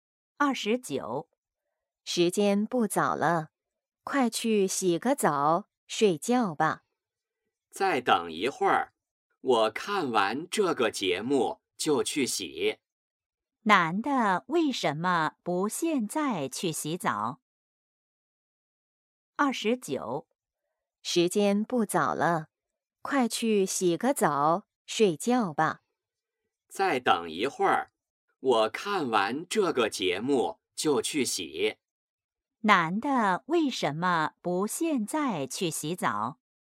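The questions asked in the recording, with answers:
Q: 男的为什么不现在去洗澡?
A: 想看完节目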